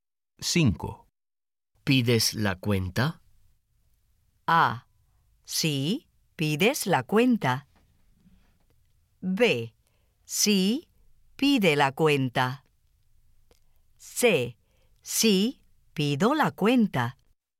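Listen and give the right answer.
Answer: C: Sí, pido la cuenta.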